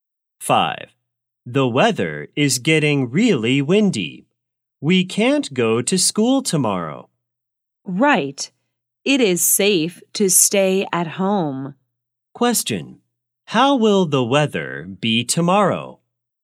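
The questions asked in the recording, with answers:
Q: How will the weather be tomorrow?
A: Windy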